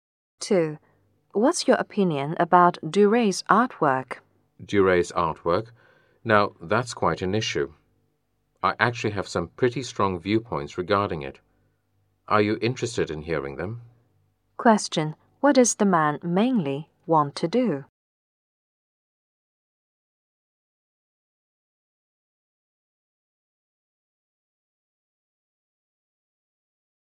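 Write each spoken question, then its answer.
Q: what does the man mainly want to do?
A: Share his strong opinions about Duray's artwork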